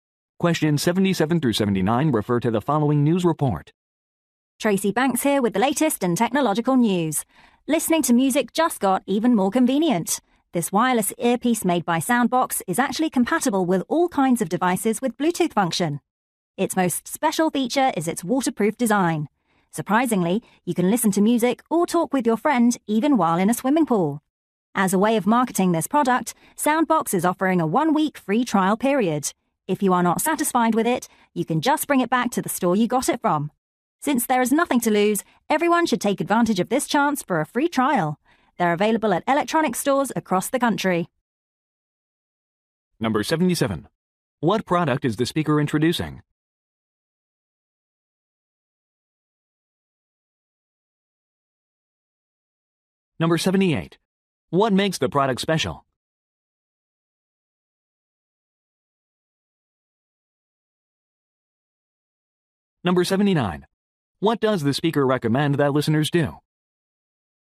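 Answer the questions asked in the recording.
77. A wireless earpiece
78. It is waterproof
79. Try the product free for a week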